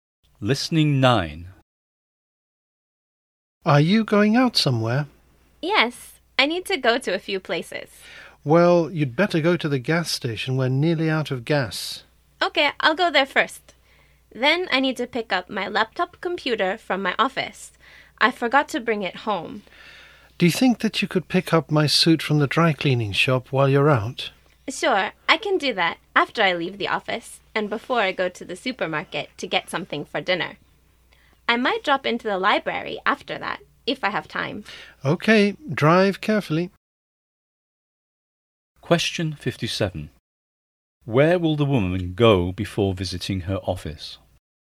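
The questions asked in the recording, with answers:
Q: Where will the woman go before visiting her office?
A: The gas station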